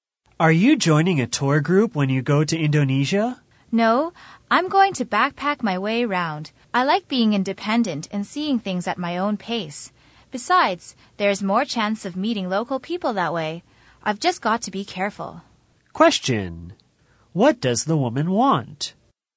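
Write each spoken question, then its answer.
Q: What does the woman want?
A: To backpack independently and meet local people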